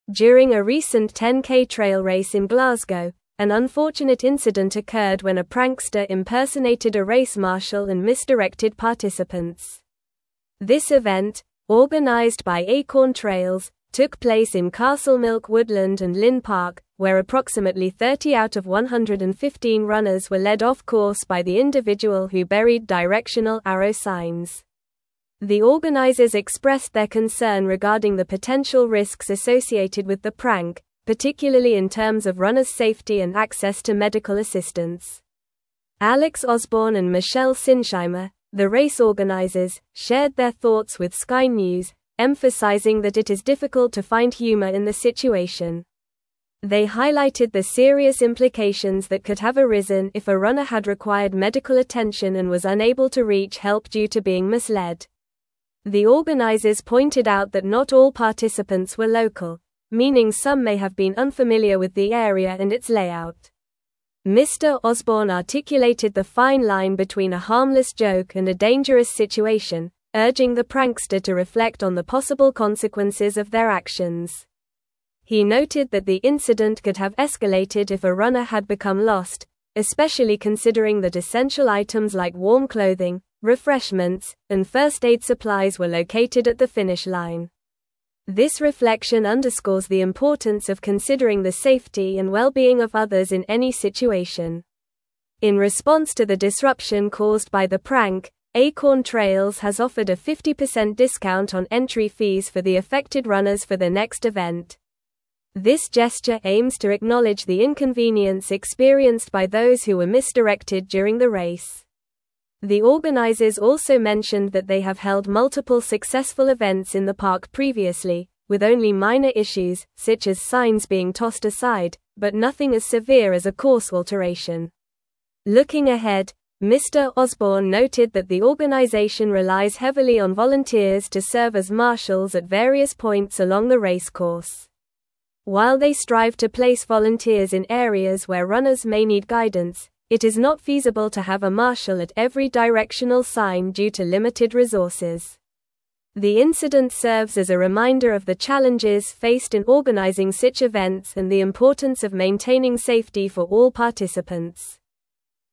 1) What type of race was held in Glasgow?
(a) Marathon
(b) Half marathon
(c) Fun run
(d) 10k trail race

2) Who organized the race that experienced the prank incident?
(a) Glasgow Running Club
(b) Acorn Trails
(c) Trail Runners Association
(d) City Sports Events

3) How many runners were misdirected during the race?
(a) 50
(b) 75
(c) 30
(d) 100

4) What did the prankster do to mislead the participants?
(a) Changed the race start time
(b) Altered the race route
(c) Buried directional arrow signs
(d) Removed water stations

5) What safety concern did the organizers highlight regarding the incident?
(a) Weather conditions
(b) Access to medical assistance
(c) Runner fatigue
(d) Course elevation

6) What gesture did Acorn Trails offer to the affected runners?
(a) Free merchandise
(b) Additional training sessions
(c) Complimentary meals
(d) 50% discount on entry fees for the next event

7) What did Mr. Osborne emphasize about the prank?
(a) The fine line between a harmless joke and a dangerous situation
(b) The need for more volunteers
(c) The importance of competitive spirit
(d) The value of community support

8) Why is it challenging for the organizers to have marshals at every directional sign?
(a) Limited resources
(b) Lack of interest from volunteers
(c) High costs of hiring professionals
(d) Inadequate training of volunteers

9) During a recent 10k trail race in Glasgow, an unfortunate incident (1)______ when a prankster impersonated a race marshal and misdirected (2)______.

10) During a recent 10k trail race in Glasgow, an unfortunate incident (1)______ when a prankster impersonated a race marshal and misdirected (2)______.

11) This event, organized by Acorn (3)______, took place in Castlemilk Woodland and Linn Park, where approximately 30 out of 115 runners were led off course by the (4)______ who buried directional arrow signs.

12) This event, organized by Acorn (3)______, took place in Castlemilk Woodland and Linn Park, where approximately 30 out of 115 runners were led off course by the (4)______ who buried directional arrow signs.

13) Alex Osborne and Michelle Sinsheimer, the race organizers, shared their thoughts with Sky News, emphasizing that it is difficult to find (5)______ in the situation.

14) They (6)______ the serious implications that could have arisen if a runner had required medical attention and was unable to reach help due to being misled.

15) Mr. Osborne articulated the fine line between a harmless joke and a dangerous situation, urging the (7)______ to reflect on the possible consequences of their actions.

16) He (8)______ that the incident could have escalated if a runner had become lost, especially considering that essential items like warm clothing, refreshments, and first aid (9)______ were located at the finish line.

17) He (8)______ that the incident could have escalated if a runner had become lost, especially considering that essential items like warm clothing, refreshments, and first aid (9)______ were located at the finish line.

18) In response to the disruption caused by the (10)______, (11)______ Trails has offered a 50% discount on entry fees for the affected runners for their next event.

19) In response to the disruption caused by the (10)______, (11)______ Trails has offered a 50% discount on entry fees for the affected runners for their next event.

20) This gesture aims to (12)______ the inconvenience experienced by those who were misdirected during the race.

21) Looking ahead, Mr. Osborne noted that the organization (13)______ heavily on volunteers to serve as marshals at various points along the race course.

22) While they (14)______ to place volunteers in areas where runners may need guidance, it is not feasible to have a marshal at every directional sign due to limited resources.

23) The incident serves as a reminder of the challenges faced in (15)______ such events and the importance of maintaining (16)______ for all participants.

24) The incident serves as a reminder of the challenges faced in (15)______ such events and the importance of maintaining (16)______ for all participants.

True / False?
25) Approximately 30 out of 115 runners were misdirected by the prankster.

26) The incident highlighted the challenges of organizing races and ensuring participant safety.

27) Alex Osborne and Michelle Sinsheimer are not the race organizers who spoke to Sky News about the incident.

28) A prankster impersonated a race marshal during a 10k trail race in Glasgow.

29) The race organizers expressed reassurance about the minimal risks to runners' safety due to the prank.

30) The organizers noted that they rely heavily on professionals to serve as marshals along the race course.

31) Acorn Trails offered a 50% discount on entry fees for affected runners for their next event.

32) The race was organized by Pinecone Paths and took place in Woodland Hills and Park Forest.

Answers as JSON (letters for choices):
{"1": "d", "2": "b", "3": "c", "4": "c", "5": "b", "6": "d", "7": "a", "8": "a", "9": "occurred", "10": "participants", "11": "Trails", "12": "individual", "13": "humor", "14": "highlighted", "15": "prankster", "16": "noted", "17": "supplies", "18": "prank", "19": "Acorn", "20": "acknowledge", "21": "relies", "22": "strive", "23": "organizing", "24": "safety", "25": "True", "26": "True", "27": "False", "28": "True", "29": "False", "30": "False", "31": "True", "32": "False"}

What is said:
During a recent 10k trail race in Glasgow, an unfortunate incident occurred when a prankster impersonated a race marshal and misdirected participants. This event, organized by Acorn Trails, took place in Castlemilk Woodland and Linn Park, where approximately 30 out of 115 runners were led off course by the individual who buried directional arrow signs. The organizers expressed their concern regarding the potential risks associated with the prank, particularly in terms of runners' safety and access to medical assistance.
Alex Osborne and Michelle Sinsheimer, the race organizers, shared their thoughts with Sky News, emphasizing that it is difficult to find humor in the situation. They highlighted the serious implications that could have arisen if a runner had required medical attention and was unable to reach help due to being misled. The organizers pointed out that not all participants were local, meaning some may have been unfamiliar with the area and its layout.
Mr. Osborne articulated the fine line between a harmless joke and a dangerous situation, urging the prankster to reflect on the possible consequences of their actions. He noted that the incident could have escalated if a runner had become lost, especially considering that essential items like warm clothing, refreshments, and first aid supplies were located at the finish line. This reflection underscores the importance of considering the safety and well-being of others in any situation.
In response to the disruption caused by the prank, Acorn Trails has offered a 50% discount on entry fees for the affected runners for their next event. This gesture aims to acknowledge the inconvenience experienced by those who were misdirected during the race. The organizers also mentioned that they have held multiple successful events in the park previously, with only minor issues, such as signs being tossed aside, but nothing as severe as a course alteration.
Looking ahead, Mr. Osborne noted that the organization relies heavily on volunteers to serve as marshals at various points along the race course. While they strive to place volunteers in areas where runners may need guidance, it is not feasible to have a marshal at every directional sign due to limited resources. The incident serves as a reminder of the challenges faced in organizing such events and the importance of maintaining safety for all participants.

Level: Level 4